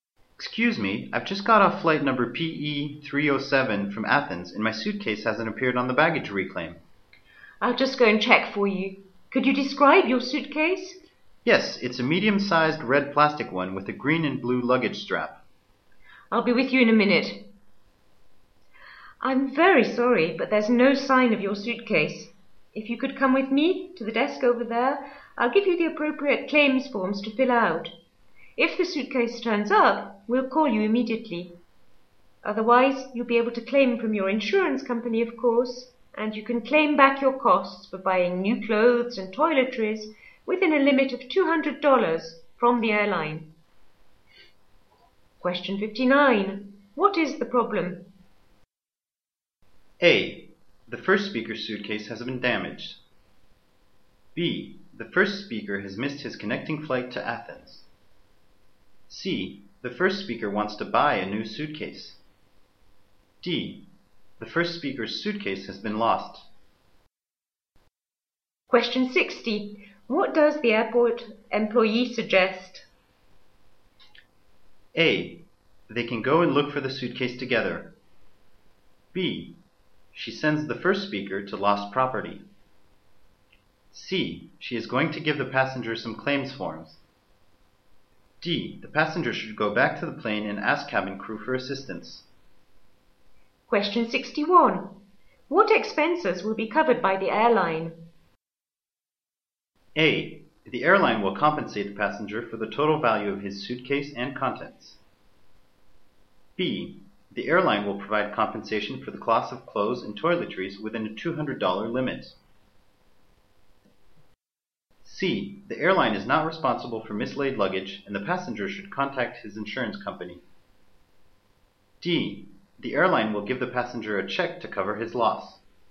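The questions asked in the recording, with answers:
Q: What is the problem?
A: D: The first speaker's suitcase has been lost.

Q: What does the airport employee suggest?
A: C: She is going to give the passenger some claims forms.

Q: What expenses will be covered by the airline?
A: B: The airline will provide compensation for the cost of clothes and toiletries within a $200 limit.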